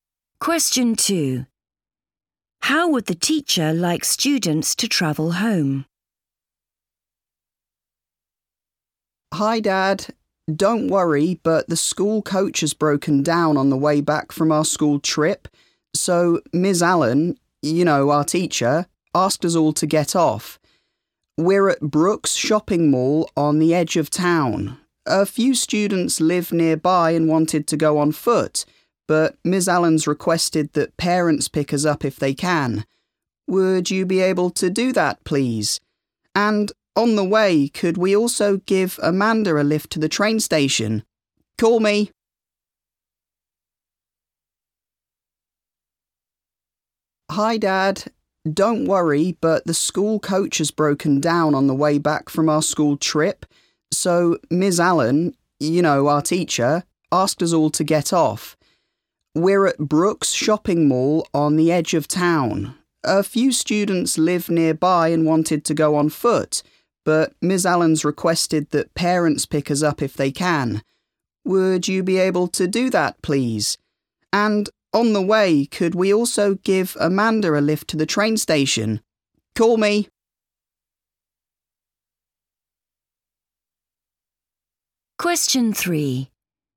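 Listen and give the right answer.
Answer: Parents pick them up by car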